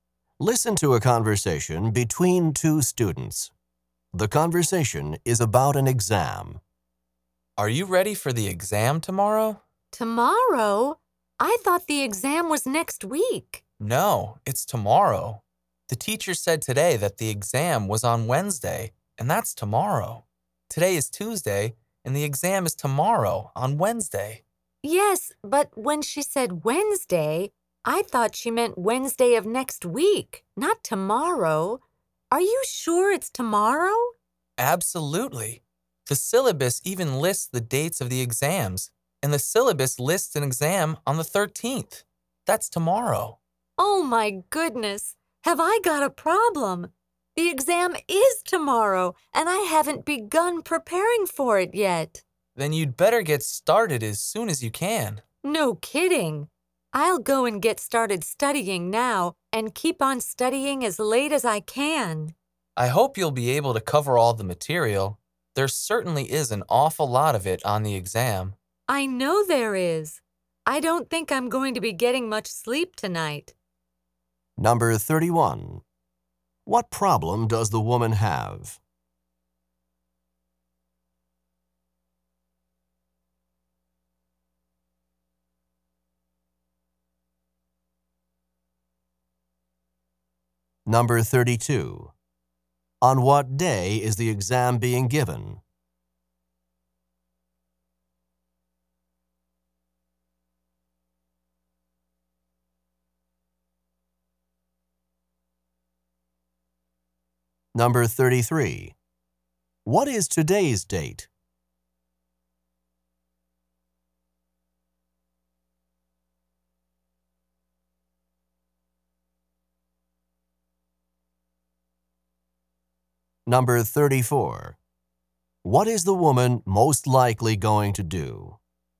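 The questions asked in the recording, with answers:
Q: What problem does the woman have?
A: She thought the exam was next week, so she hasn't started preparing for tomorrow's exam

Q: On what day is the exam being given?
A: Wednesday (tomorrow)

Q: What is today's date?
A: The 12th

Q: What is the woman most likely going to do?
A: Study late into the night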